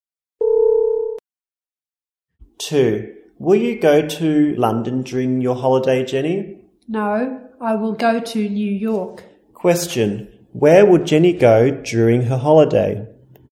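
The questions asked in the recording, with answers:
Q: Where would Jenny go during her holiday?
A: New York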